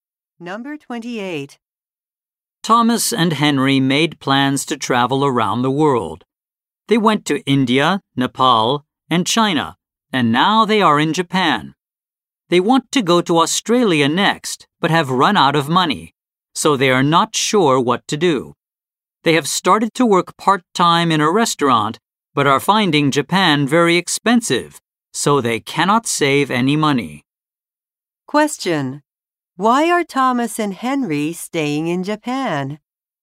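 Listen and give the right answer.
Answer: They have run out of money to go to Australia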